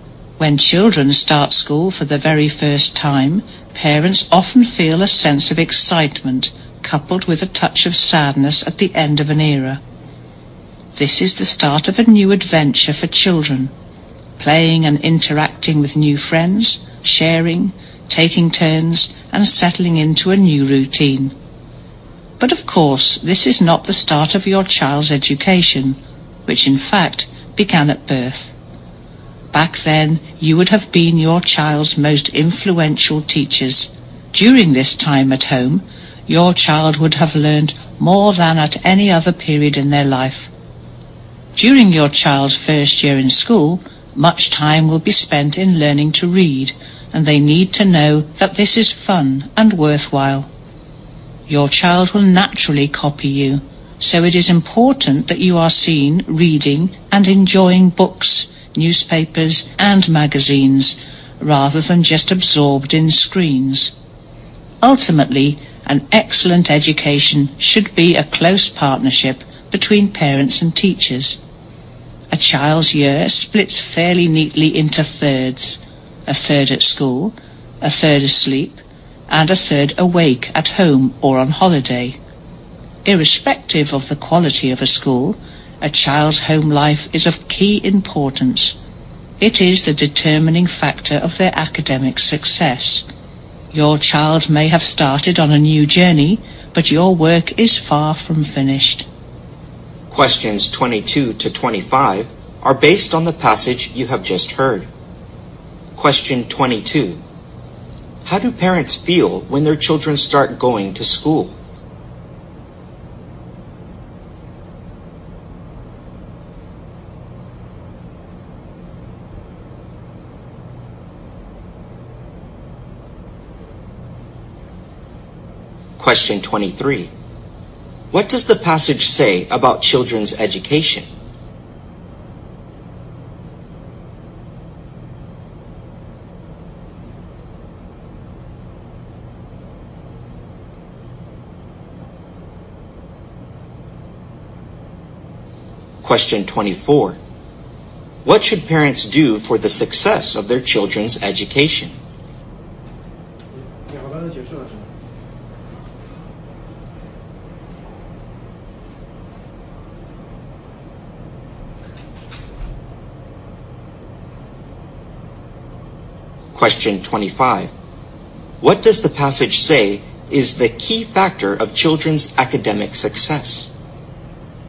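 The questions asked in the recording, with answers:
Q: How do parents feel when their children start going to school?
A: Excited with a touch of sadness

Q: What does the passage say about children's education?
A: It begins at birth

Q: What does the passage say is the key factor of children's academic success?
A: The child's home life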